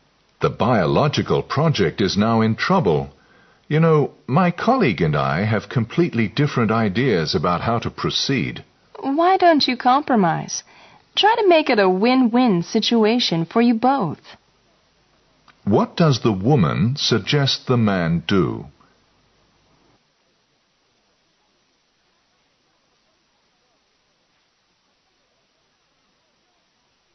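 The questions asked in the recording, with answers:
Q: What does the woman suggest the man do?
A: Compromise with his colleague to reach a win-win solution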